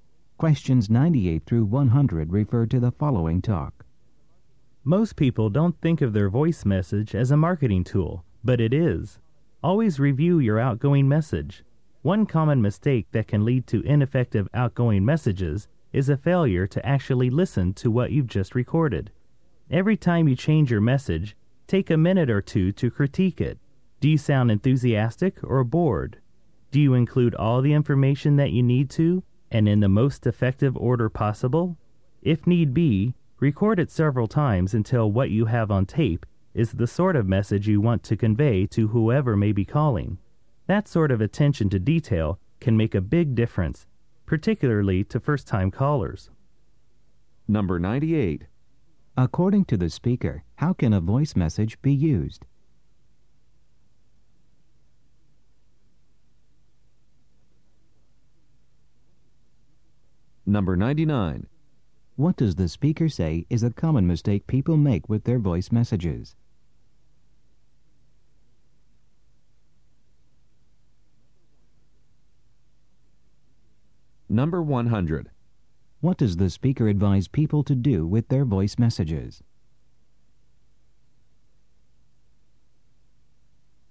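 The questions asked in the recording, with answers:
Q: According to the speaker, how can a voice message be used?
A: As a marketing tool

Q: What does the speaker say is a common mistake people make with their voice messages?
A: Not listening to what they have recorded

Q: What does the speaker advise people to do with their voice messages?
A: Review it and re-record it if needed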